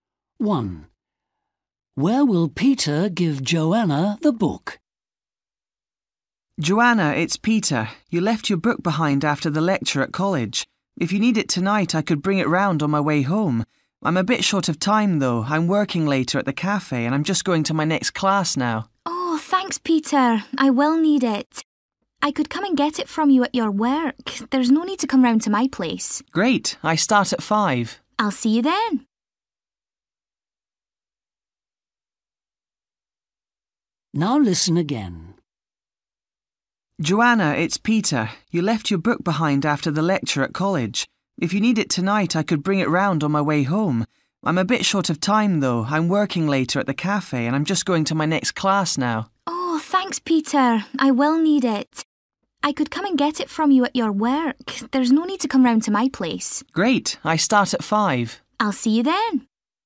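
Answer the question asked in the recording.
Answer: At the cafe where Peter works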